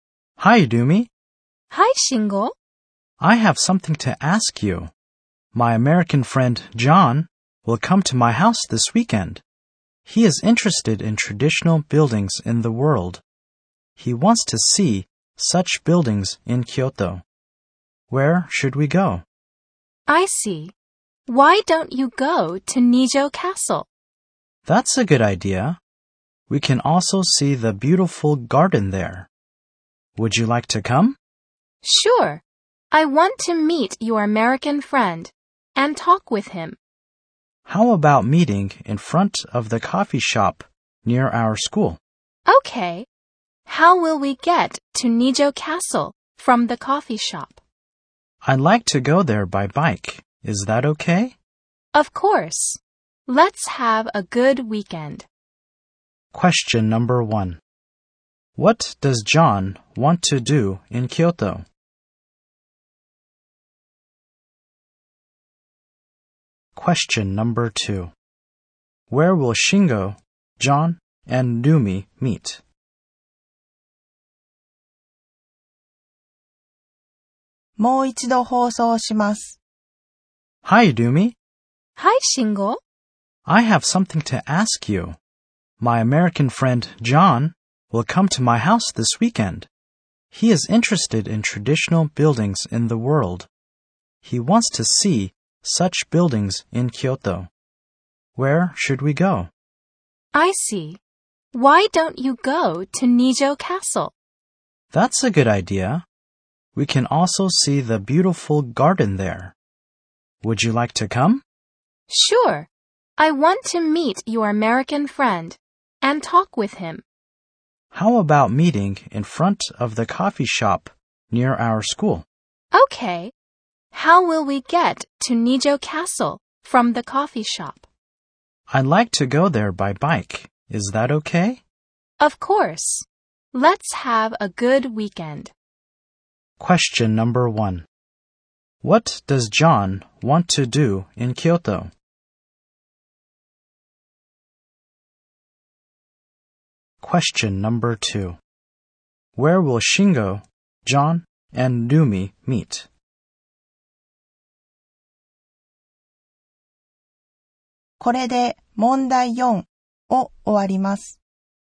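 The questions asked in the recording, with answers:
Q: What does John want to do in Kyoto?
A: See traditional buildings.

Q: Where will Shingo, John, and Numi meet?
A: In front of the coffee shop near their school.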